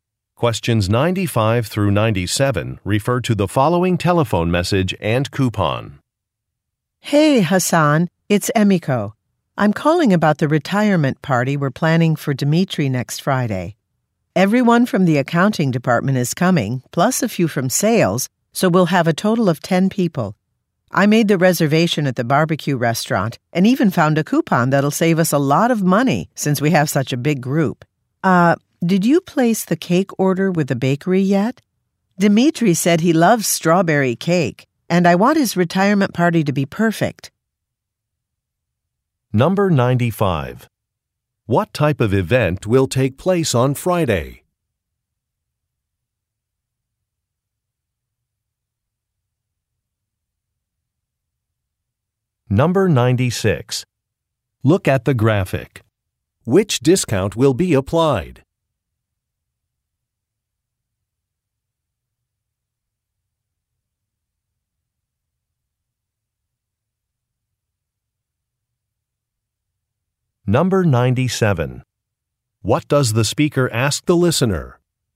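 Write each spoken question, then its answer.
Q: What type of event will take place on Friday?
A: A retirement party

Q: What does the speaker ask the listener?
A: Whether he has ordered the cake from the bakery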